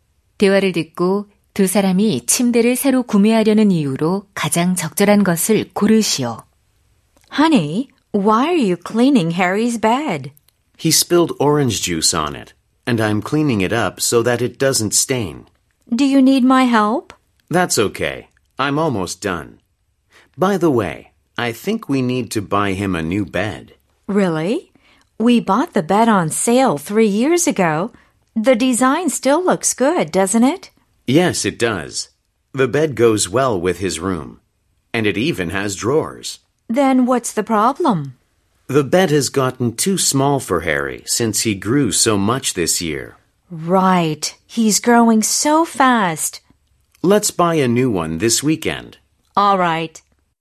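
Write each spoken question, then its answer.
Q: 대화를 듣고 두 사람이 침대를 새로 구매하려는 이유로 가장 적절한 것을 고르시오.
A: 아이가 자라서 침대가 작아져서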